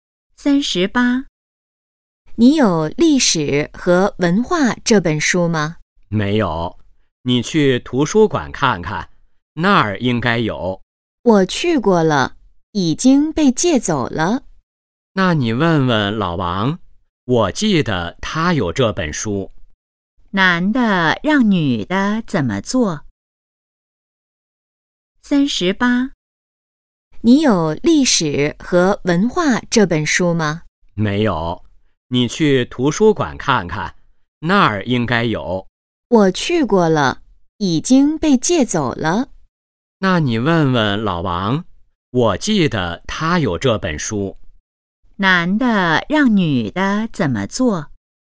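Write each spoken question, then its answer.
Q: 男的让女的怎么做?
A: 去问问老王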